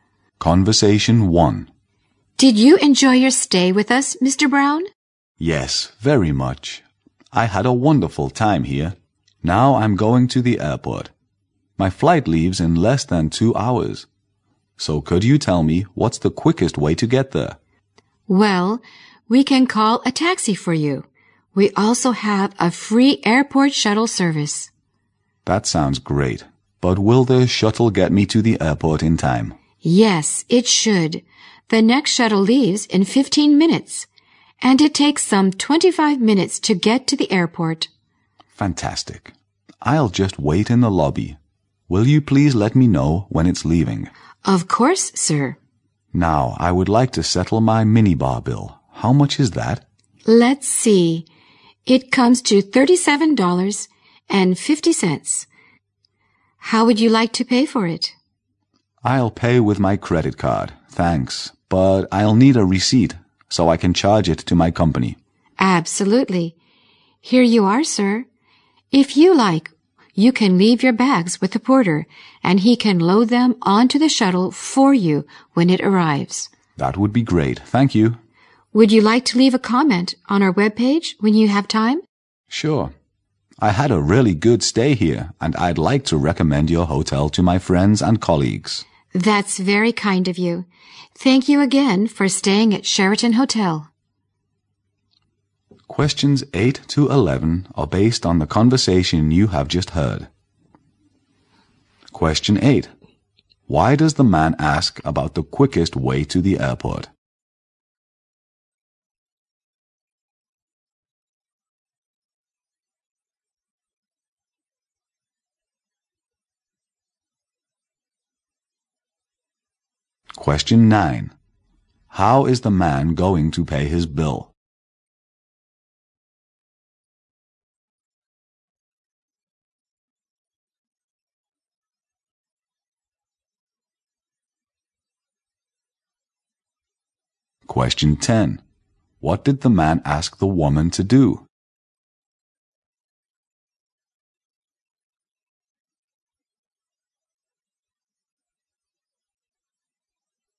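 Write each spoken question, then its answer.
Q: Why does the man ask about the quickest way to the airport?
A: His flight leaves in less than 2 hours

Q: How is the man going to pay his bill?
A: With his credit card

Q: What did the man ask the woman to do?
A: Let him know when the shuttle is leaving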